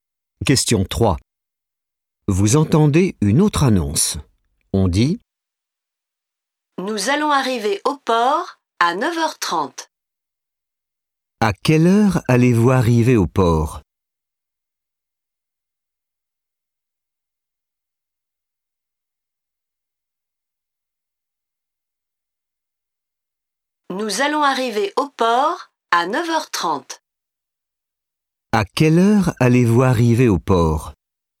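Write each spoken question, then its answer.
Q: À quelle heure allez-vous arriver au port ?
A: À 9h30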